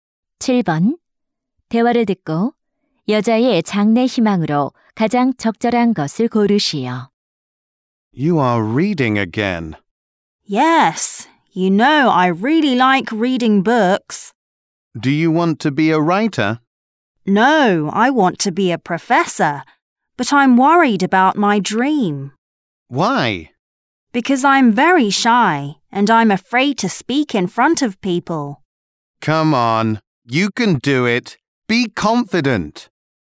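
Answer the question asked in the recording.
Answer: 교수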